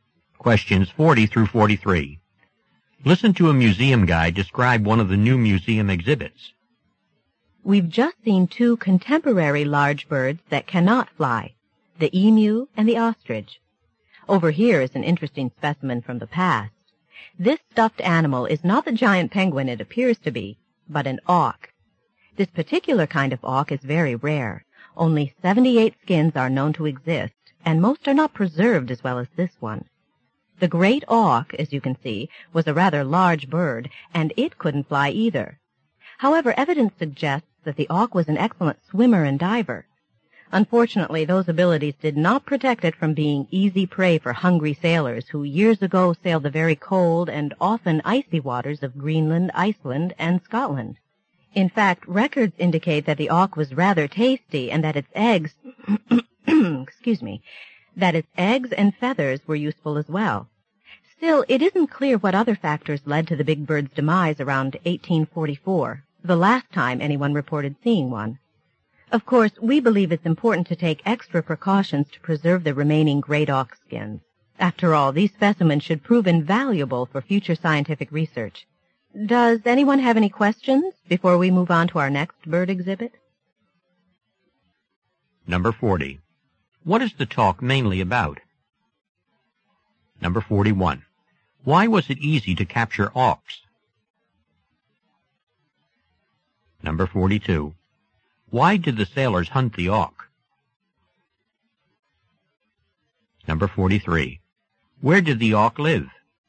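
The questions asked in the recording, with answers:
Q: What is the talk mainly about?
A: The great auk, an extinct bird

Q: Why was it easy to capture auks?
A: They couldn't fly

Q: Why did the sailors hunt the auk?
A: For food (also eggs and feathers)

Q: Where did the auk live?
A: In cold waters near Greenland, Iceland and Scotland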